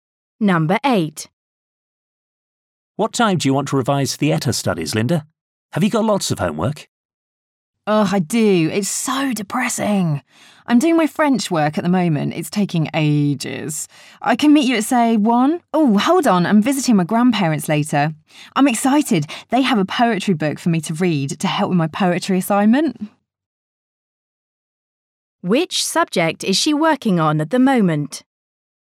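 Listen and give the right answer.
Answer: French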